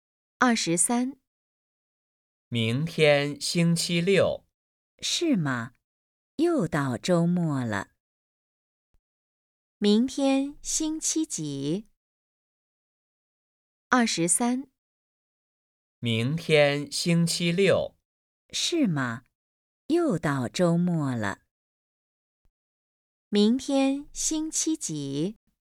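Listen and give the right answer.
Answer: 星期六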